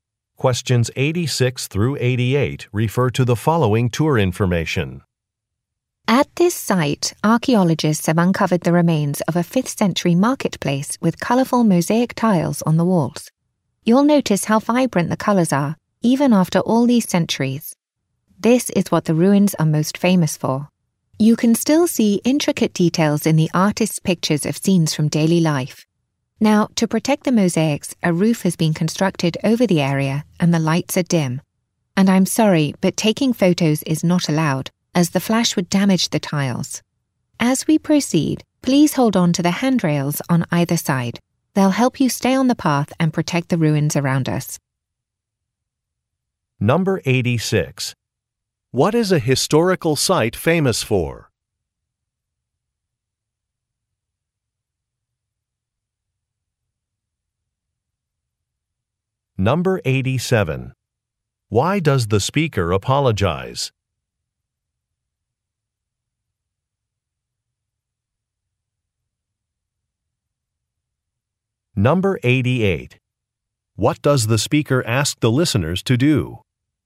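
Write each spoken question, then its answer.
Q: What is a historical site famous for?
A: Its vibrant, colourful mosaic tiles

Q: Why does the speaker apologize?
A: Taking photos is not allowed

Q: What does the speaker ask the listeners to do?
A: Hold on to the handrails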